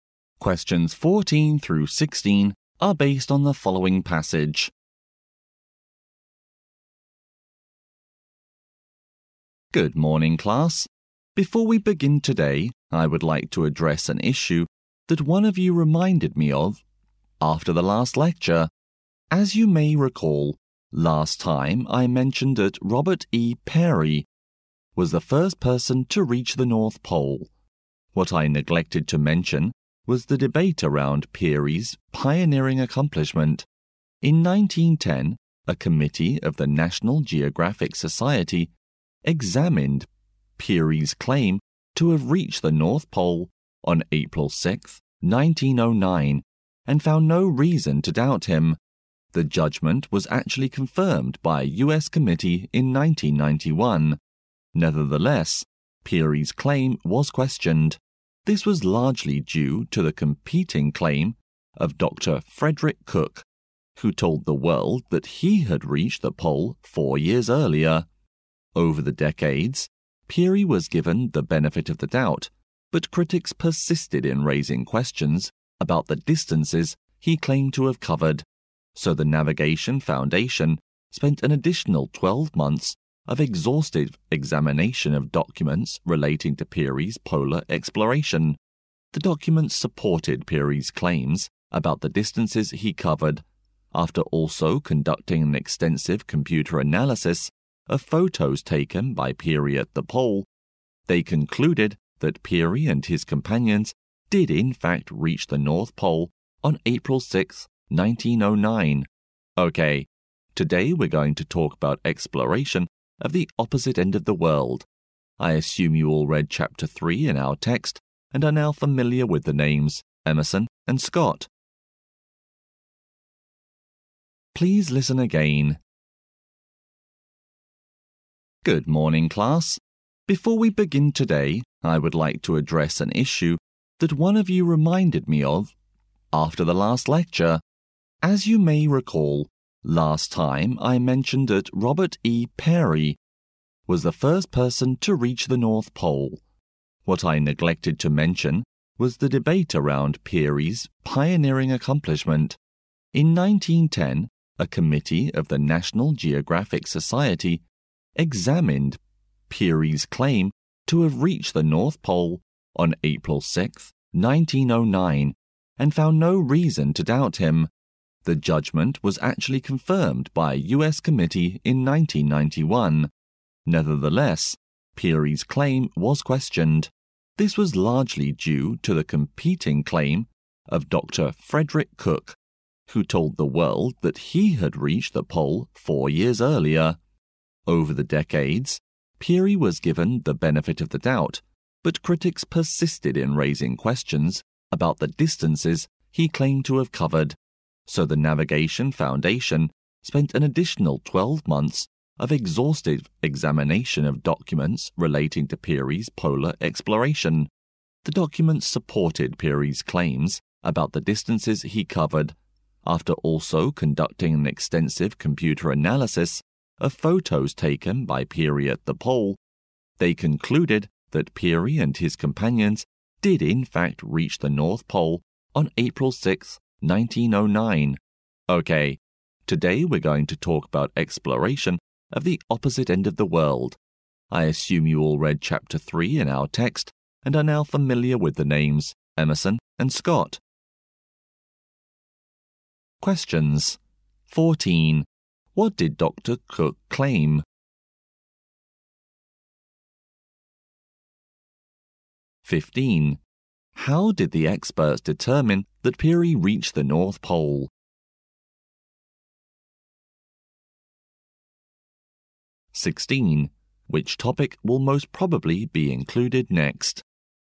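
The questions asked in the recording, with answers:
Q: What did Dr. Cook claim?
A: That he reached the North Pole 4 years before Peary

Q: How did the experts determine that Peary reached the North Pole?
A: By examining documents and analysing his photos by computer

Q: Which topic will most probably be included next?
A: Exploration of the South Pole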